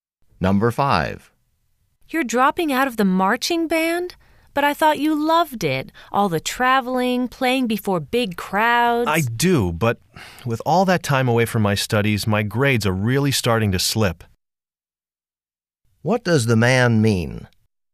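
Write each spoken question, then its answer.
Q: What does the man mean?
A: He is leaving the band because his grades are dropping.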